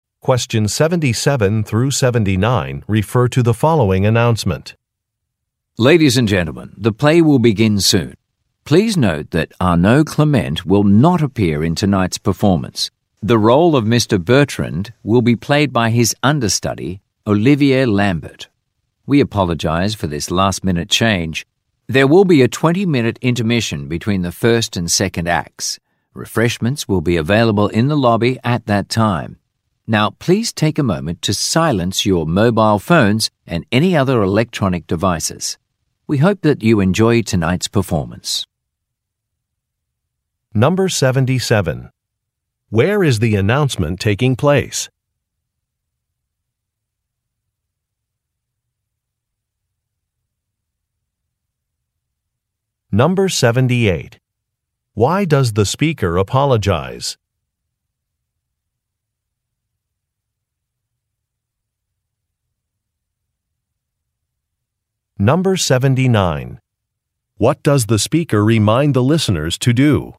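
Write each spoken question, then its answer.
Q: Where is the announcement taking place?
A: At a theater

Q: Why does the speaker apologize?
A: Because an actor has been replaced at the last minute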